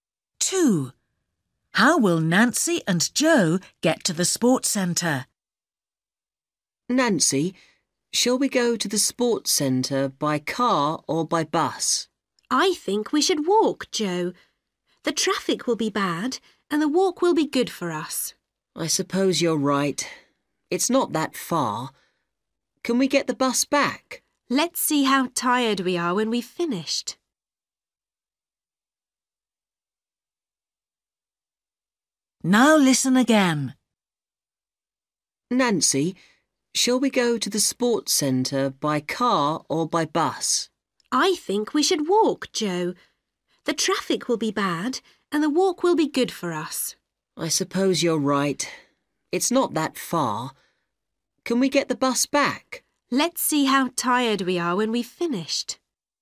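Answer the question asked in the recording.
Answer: they will walk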